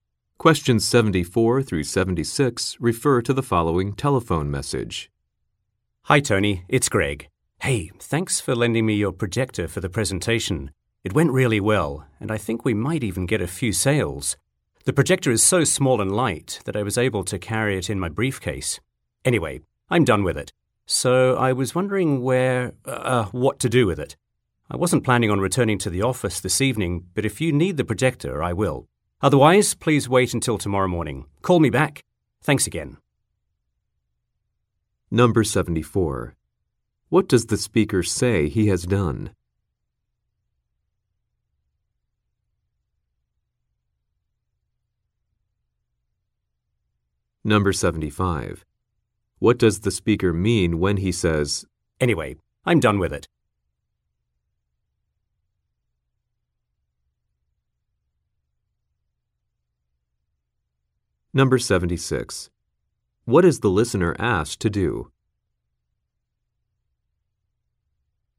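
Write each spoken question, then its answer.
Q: What does the speaker say he has done?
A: Given a presentation using Tony's projector

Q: What is the listener asked to do?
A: Call him back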